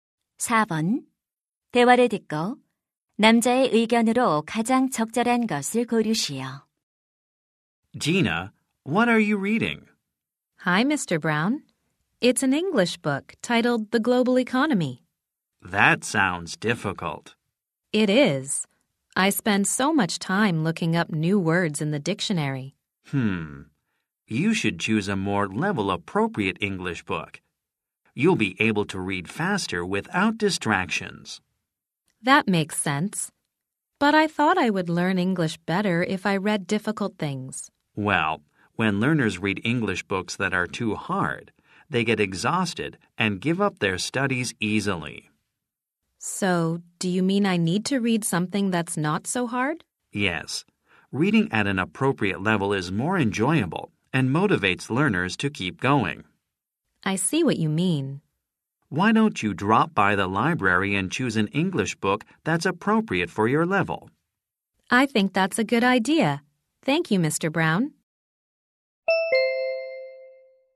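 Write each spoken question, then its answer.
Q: 대화를 듣고 남자의 의견으로 가장 적절한 것을 고르시오.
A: 수준에 맞는 영어책을 읽어야 한다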